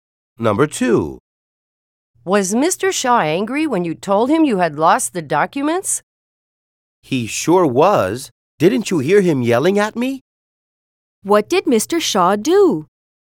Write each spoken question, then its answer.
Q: What did Mr. Shaw do?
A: If Mr. Shaw yelled at the man, then he shouted at him.